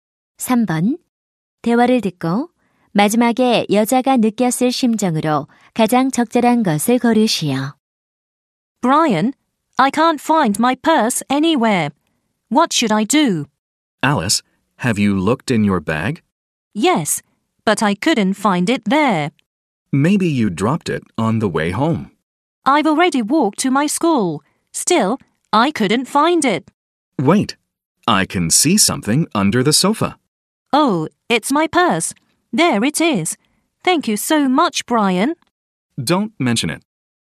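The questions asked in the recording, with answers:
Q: 대화를 듣고 마지막에 여자가 느꼈을 심정으로 가장 적절한 것을 고르시오.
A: 안도하고 고마움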